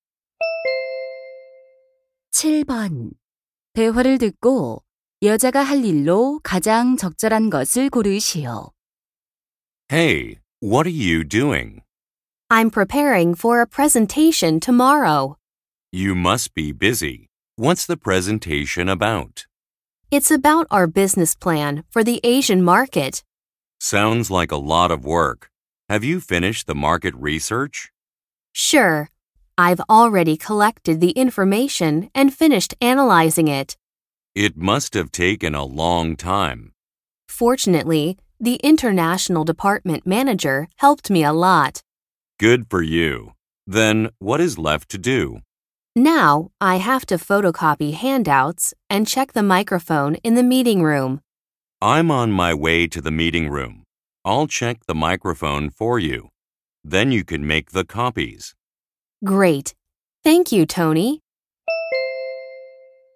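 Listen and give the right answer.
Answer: 유인물 복사하기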